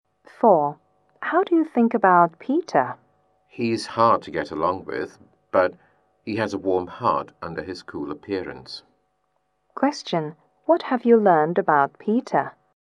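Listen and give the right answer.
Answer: He seems cool and hard to get along with but is warm-hearted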